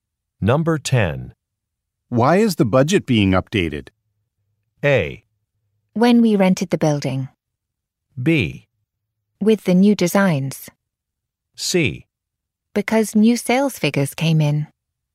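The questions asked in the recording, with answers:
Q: Why is the budget being updated?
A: C: Because new sales figures came in.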